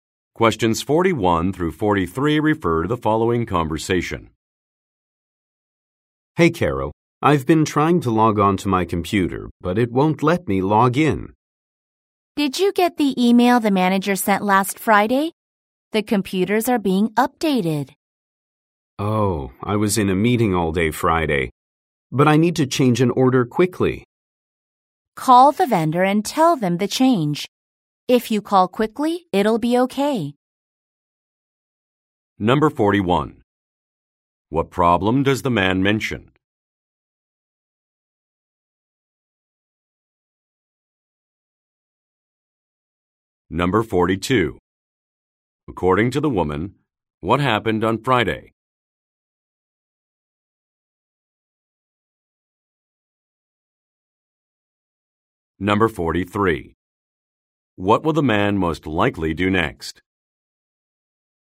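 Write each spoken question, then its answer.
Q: What problem does the man mention?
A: He can't log in to his computer

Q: According to the woman, what happened on Friday?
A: The manager sent an email

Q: What will the man most likely do next?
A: Call the vendor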